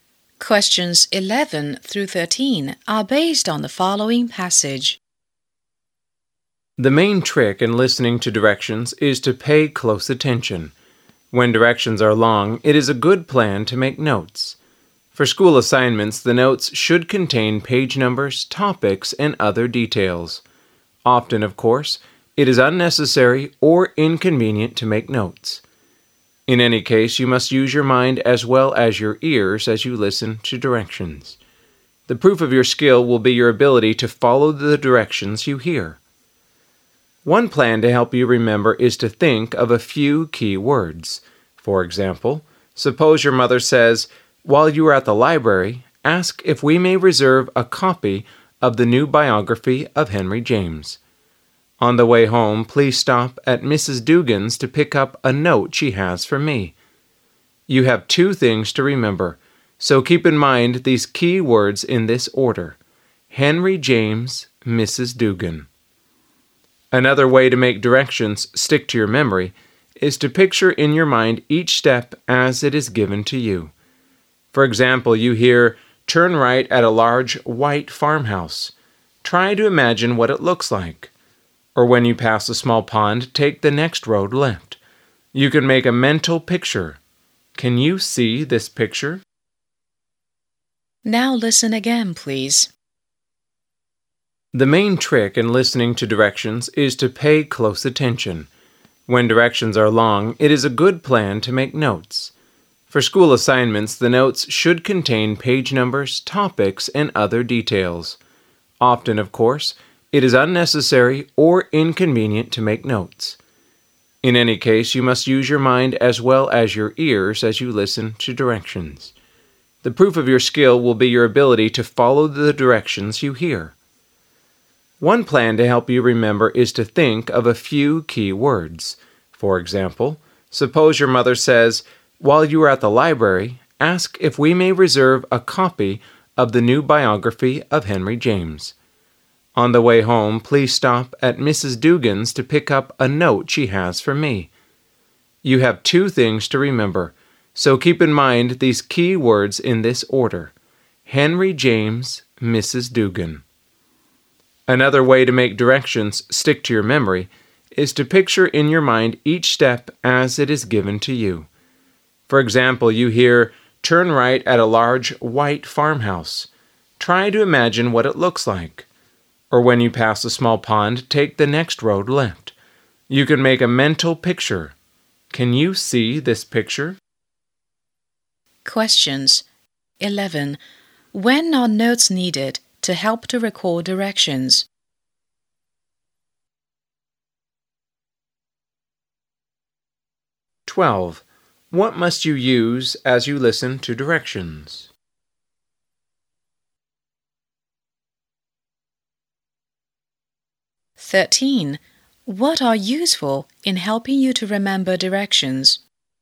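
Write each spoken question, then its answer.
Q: When are notes needed to help to recall directions?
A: When directions are long

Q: What must you use as you listen to directions?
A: Your mind as well as your ears

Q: What are useful in helping you to remember directions?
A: Key words and mental pictures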